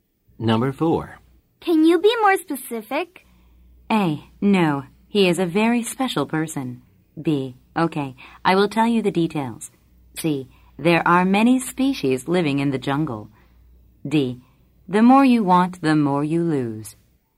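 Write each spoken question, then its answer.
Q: Can you be more specific?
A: B: Okay. I will tell you the details.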